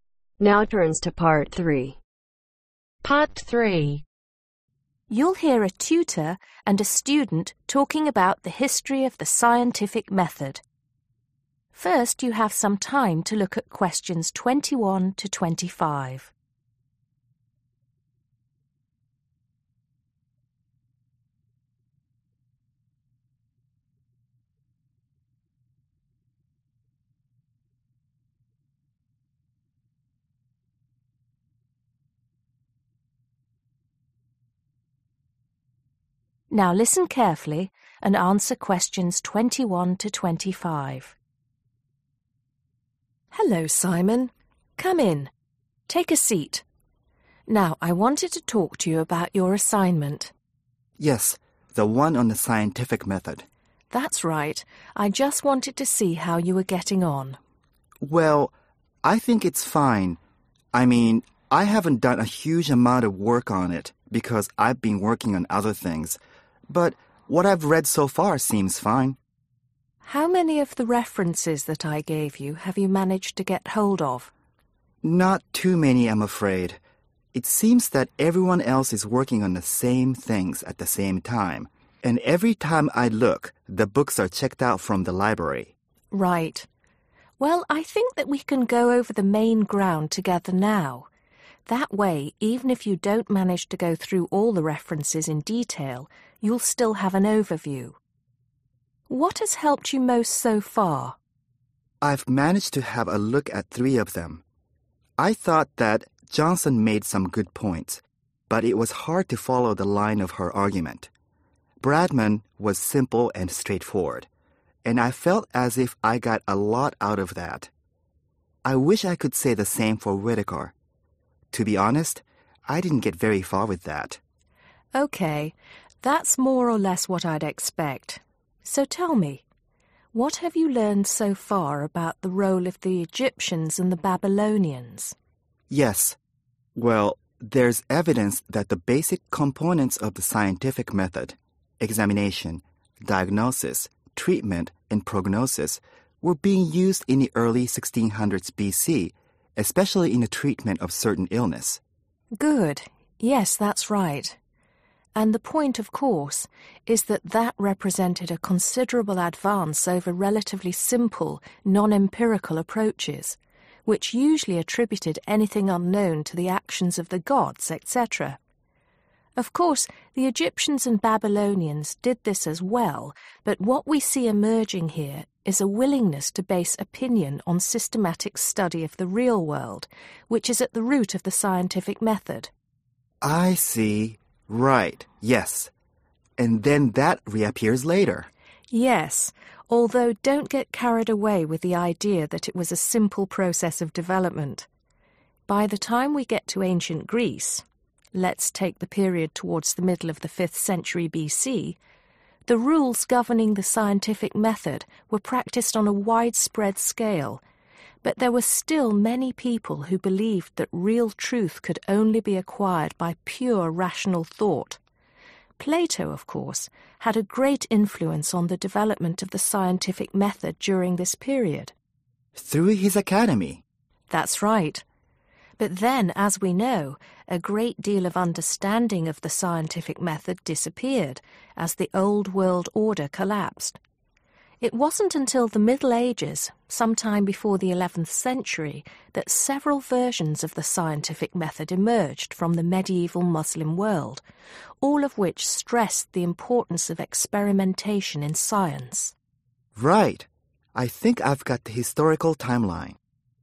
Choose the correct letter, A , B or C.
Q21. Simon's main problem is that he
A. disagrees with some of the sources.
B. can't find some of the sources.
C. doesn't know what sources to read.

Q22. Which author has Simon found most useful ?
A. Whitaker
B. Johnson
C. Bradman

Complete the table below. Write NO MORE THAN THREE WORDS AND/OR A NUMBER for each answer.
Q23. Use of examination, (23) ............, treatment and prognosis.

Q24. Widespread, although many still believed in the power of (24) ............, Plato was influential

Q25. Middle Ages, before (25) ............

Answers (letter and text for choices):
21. B. can't find some of the sources.
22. C. Bradman
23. diagnosis
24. pure rational thought
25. 11th century